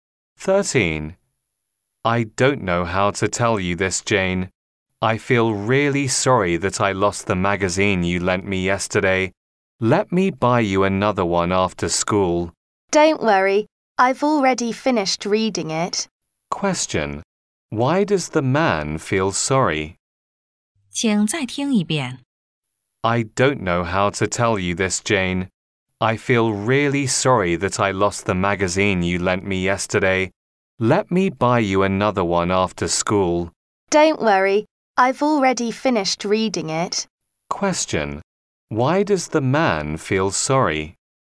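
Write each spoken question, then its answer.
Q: Why does the man feel sorry?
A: He lost the magazine Jane lent him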